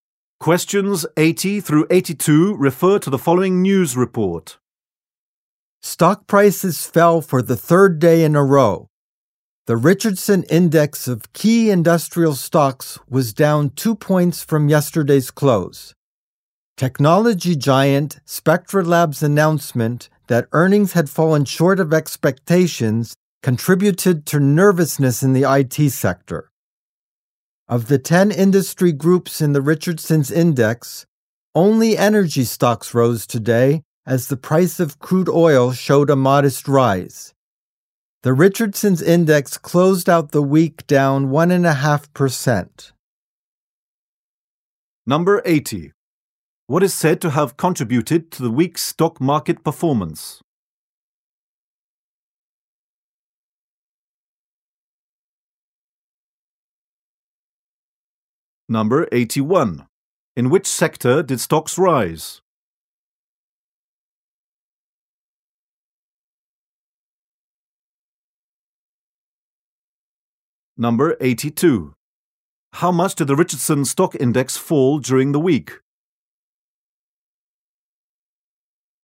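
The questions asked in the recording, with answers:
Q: What is said to have contributed to the week's stock market performance?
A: Spectra Labs' disappointing earnings

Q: In which sector did stocks rise?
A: Energy

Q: How much did the Richardson Stock Index fall during the week?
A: 1.5%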